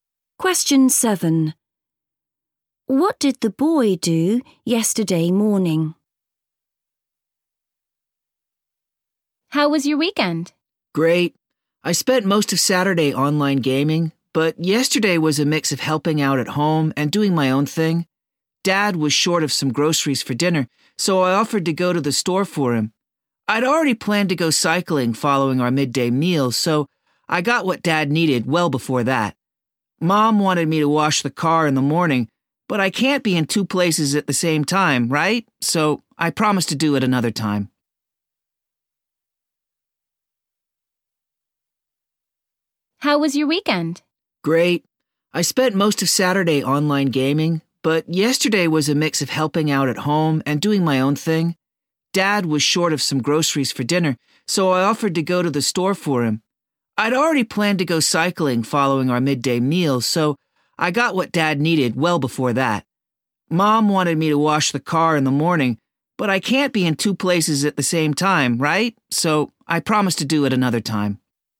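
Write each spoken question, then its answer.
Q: What did the boy do yesterday morning?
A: went to the store to buy groceries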